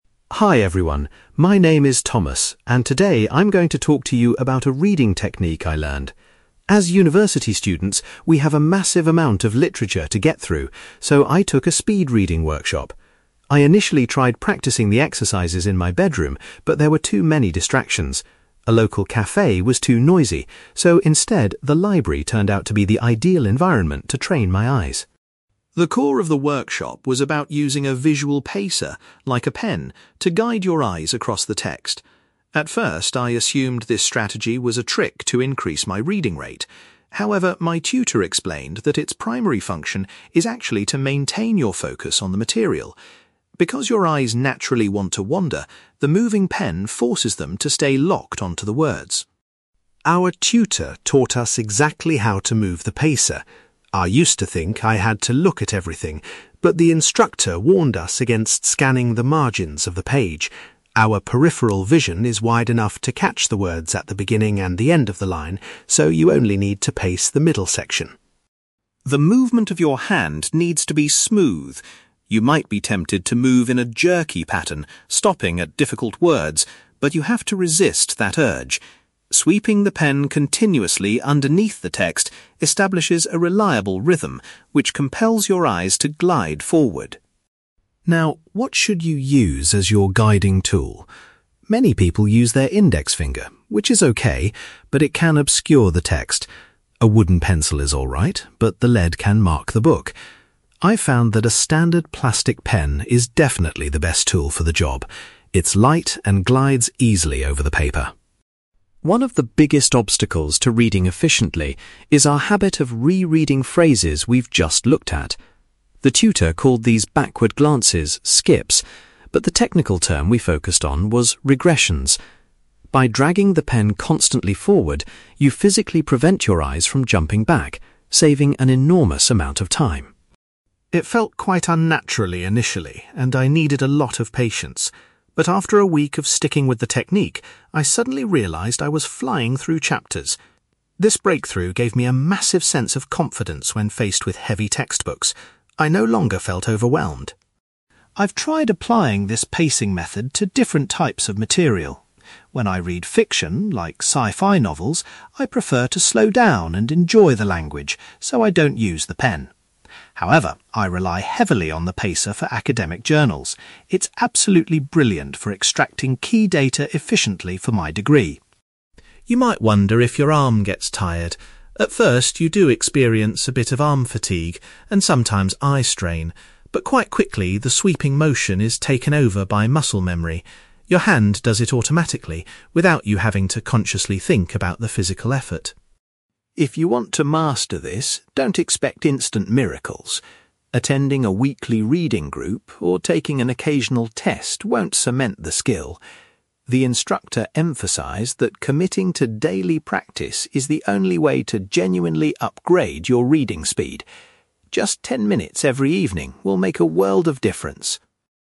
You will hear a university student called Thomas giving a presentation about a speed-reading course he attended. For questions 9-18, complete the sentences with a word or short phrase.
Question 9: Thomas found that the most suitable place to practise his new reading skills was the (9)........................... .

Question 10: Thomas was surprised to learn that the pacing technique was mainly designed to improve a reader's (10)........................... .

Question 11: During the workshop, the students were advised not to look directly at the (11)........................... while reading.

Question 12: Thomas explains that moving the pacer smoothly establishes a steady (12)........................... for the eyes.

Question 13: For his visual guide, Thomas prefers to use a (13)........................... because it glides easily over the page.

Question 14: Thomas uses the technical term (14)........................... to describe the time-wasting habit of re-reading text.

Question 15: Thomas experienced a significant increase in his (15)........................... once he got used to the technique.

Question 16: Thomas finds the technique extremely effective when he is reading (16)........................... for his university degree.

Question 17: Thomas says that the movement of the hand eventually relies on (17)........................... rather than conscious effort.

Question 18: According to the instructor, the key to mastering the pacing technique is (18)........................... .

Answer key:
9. library
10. focus
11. margins
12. rhythm
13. plastic pen
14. regressions
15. confidence
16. academic journals
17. muscle memory
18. daily practice

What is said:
Thomas: Hi everyone, my name is Thomas, and today I'm going to talk to you about a reading technique I learned. As university students, we have a massive amount of literature to get through, so I took a speed-reading workshop. I initially tried practising the exercises in my bedroom, but there were too many distractions. A local café was too noisy, so instead, the library turned out to be the ideal environment to train my eyes.
The core of the workshop was about using a visual pacer, like a pen, to guide your eyes across the text. At first, I assumed this strategy was a trick to increase my reading rate. However, my tutor explained that its primary function is actually to maintain your focus on the material. Because your eyes naturally want to wander, the moving pen forces them to stay locked onto the words.
Our tutor taught us exactly how to move the pacer. I used to think I had to look at everything, but the instructor warned us against scanning the margins of the page. Our peripheral vision is wide enough to catch the words at the beginning and the end of the line, so you only need to pace the middle section.
The movement of your hand needs to be smooth. You might be tempted to move in a jerky pattern, stopping at difficult words, but you have to resist that urge. Sweeping the pen continuously underneath the text establishes a reliable rhythm which compels your eyes to glide forward.
Now, what should you use as your guiding tool? Many people use their index finger, which is okay, but it can obscure the text. A wooden pencil is alright, but the lead can mark the book. I've found that a standard plastic pen is definitely the best tool for the job. It's light and glides easily over the paper.
One of the biggest obstacles to reading efficiently is our habit of re-reading phrases we've just looked at. The tutor called these backward glances 'skips', but the technical term we focused on was regressions. By dragging the pen constantly forward, you physically prevent your eyes from jumping back, saving an enormous amount of time.
It felt quite unnatural initially, and I needed a lot of patience. But after a week of sticking with the technique, I suddenly realised I was flying through chapters. This breakthrough gave me a massive sense of confidence when faced with heavy textbooks. I no longer felt overwhelmed.
I've tried applying this pacing method to different types of material. When I read fiction, like sci-fi novels, I prefer to slow down and enjoy the language, so I don't use the pen. However, I rely heavily on the pacer for academic journals. It's absolutely brilliant for extracting key data efficiently for my degree.
You might wonder if your arm gets tired. At first, you do experience a bit of arm fatigue, and sometimes eye strain. But quite quickly, the sweeping motion is taken over by muscle memory. Your hand does it automatically without you having to consciously think about the physical effort.
If you want to master this, don't expect instant miracles. Attending a weekly reading group or taking an occasional test won't cement the skill. The instructor emphasised that committing to daily practice is the only way to genuinely upgrade your reading speed. Just ten minutes every evening will make a world of difference.

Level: B2 English Listening Exercise